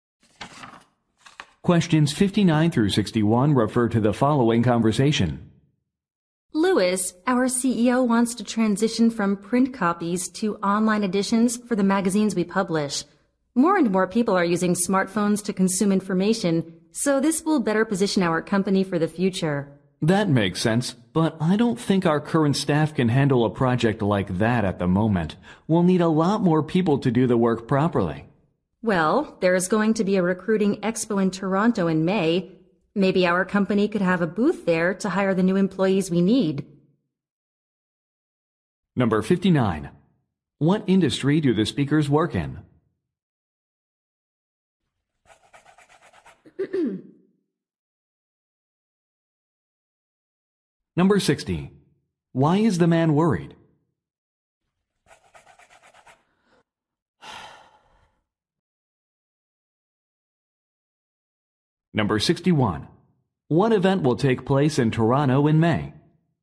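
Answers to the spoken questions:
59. Magazine publishing
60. The current staff can't handle the project
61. A recruiting expo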